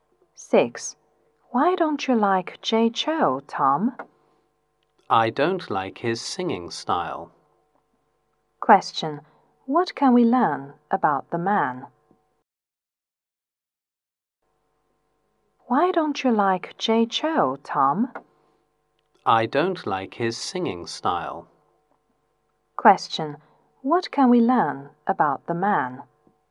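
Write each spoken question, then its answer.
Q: What can we learn about the man?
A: He doesn't like Jay Chou's singing style.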